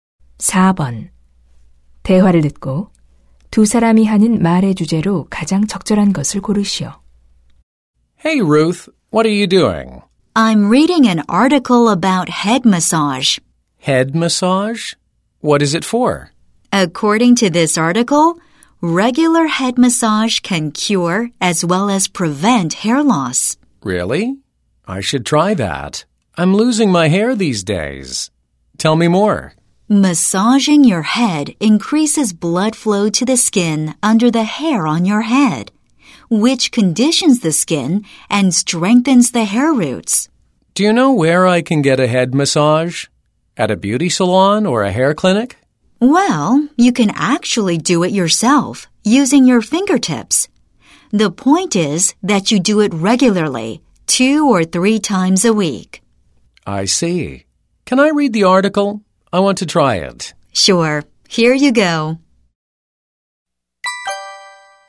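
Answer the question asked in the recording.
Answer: 탈모 예방과 치료에 좋은 두피 마사지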